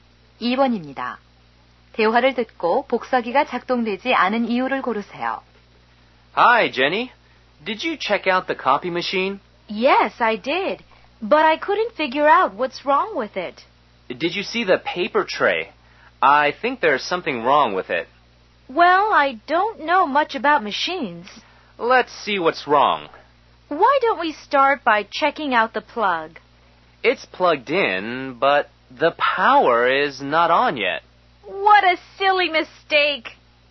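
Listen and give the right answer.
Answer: 전원이 켜지지 않아서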